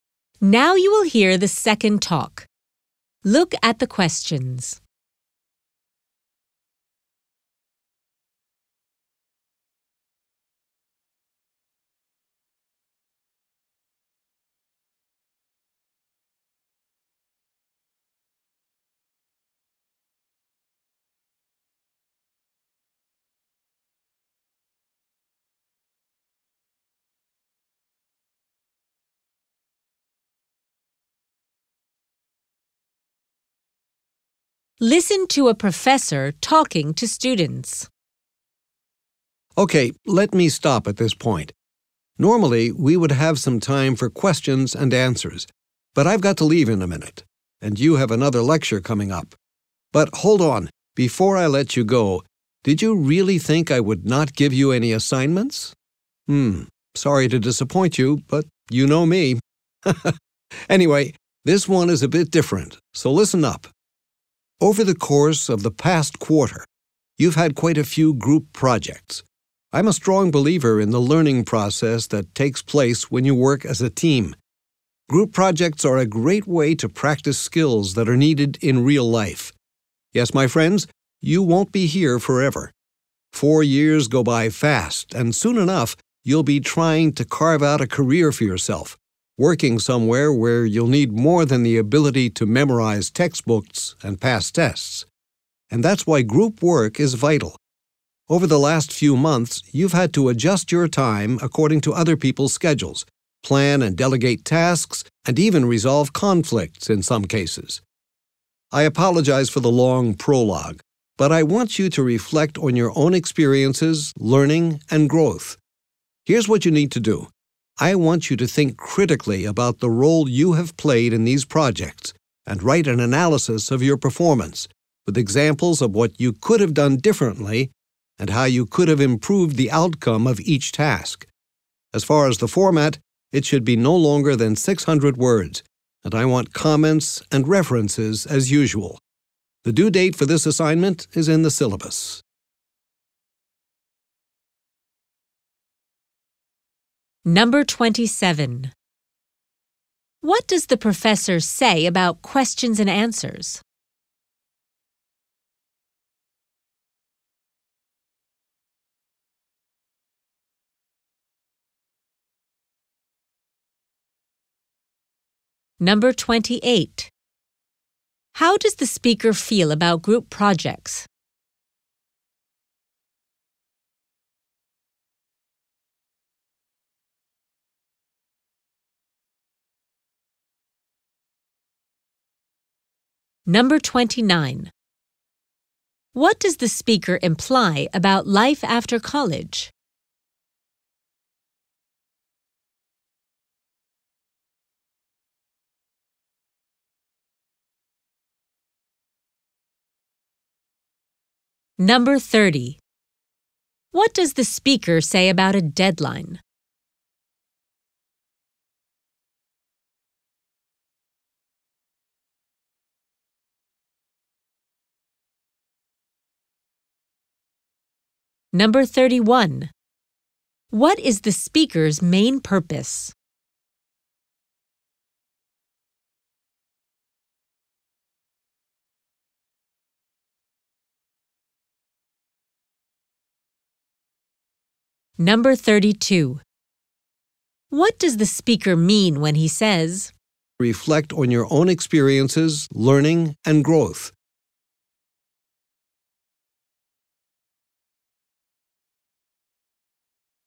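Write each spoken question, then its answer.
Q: What does the professor say about questions and answers?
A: There is no time for them today

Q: How does the speaker feel about group projects?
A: He strongly believes they are valuable

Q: What does the speaker imply about life after college?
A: It requires more than memorizing and passing tests; teamwork skills are needed

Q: What does the speaker say about a deadline?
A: It is in the syllabus

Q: What is the speaker's main purpose?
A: To give an assignment

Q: What does the speaker mean when he says,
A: He wants students to think critically about their own performance in group projects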